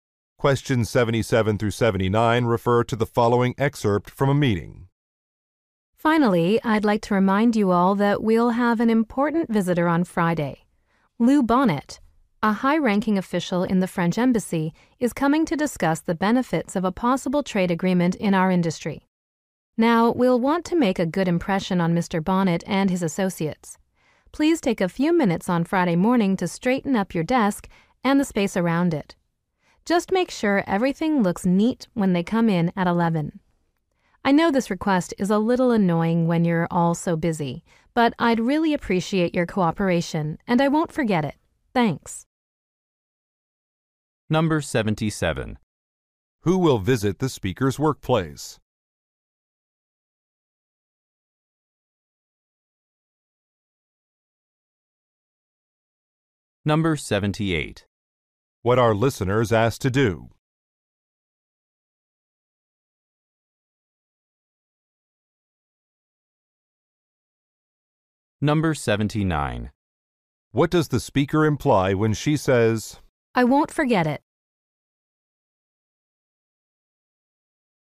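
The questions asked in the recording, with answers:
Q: Who will visit the speaker's workplace?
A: A French Embassy official

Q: What are listeners asked to do?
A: Tidy their desks and work areas

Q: I won't forget it?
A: She will be grateful for their cooperation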